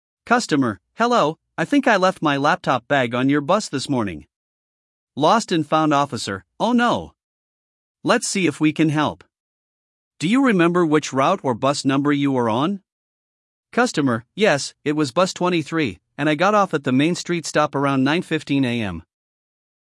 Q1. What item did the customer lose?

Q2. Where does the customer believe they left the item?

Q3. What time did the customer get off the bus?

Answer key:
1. Laptop bag
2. On a bus
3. 9:15 AM

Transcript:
Customer: Hello, I think I left my laptop bag on your bus this morning.
Lost and Found Officer: Oh no! Let's see if we can help. Do you remember which route or bus number you were on?
Customer: Yes, it was Bus 23, and I got off at the Main Street stop around 9:15 AM.